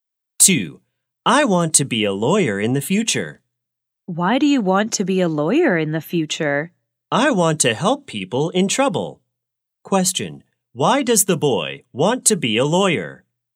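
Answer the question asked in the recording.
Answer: He wants to help people in trouble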